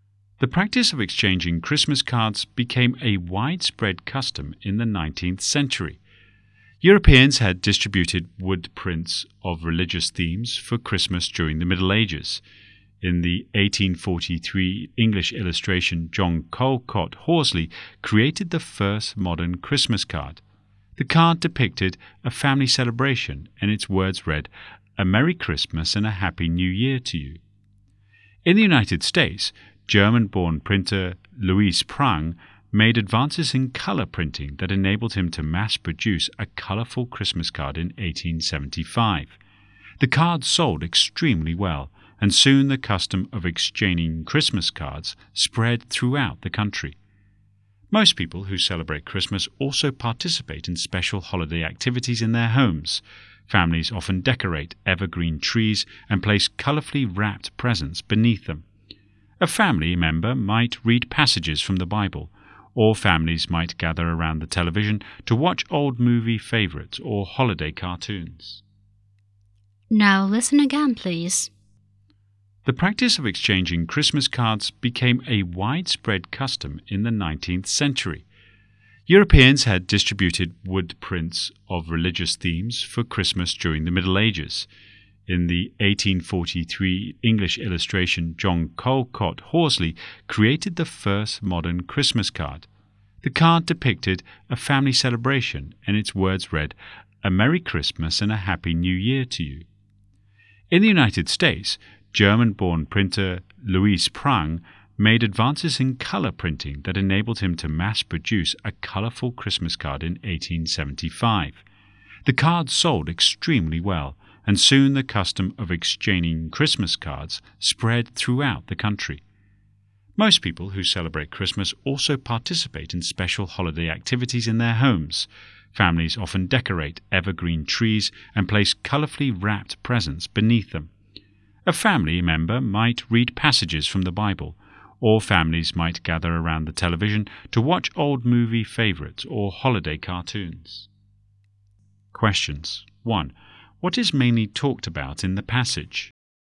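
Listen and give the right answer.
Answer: The history of Christmas cards and Christmas customs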